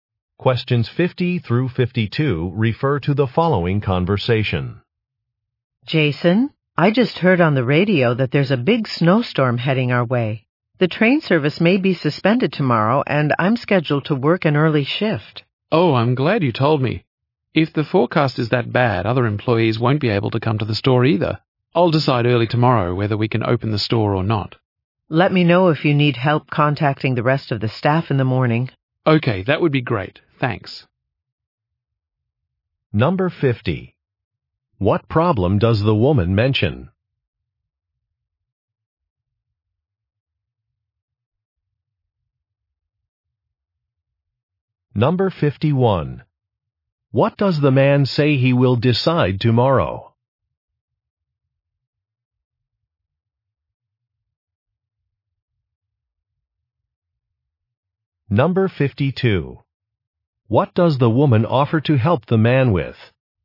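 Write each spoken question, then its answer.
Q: What problem does the woman mention?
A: A snowstorm may suspend train service

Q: What does the man say he will decide tomorrow?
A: Whether to open the store

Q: What does the woman offer to help the man with?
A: Contacting the rest of the staff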